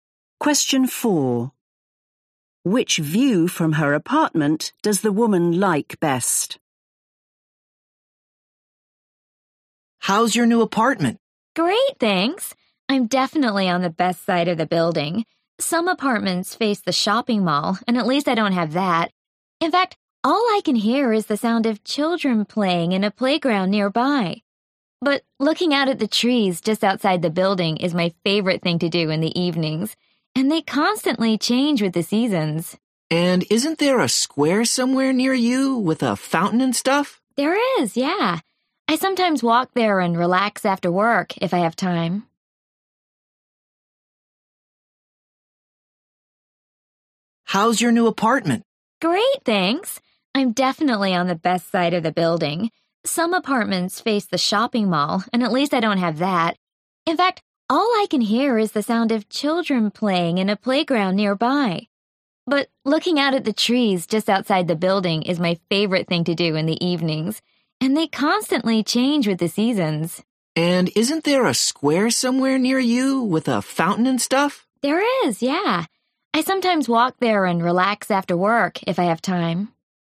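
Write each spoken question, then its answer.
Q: Which view from her apartment does the woman like best?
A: the trees outside the building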